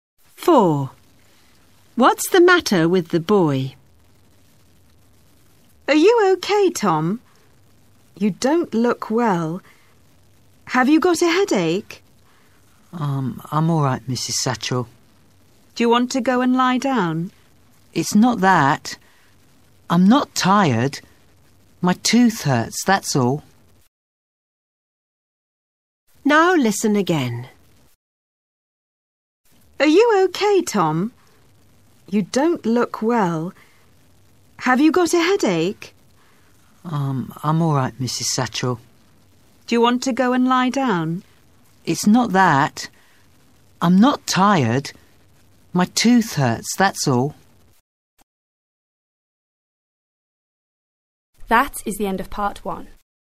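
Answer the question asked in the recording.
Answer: His tooth hurts (toothache).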